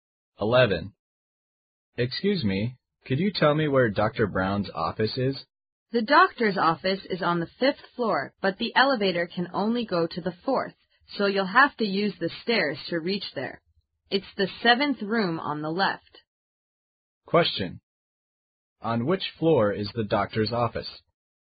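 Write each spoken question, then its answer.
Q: On which floor is the doctor's office?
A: On the 5th floor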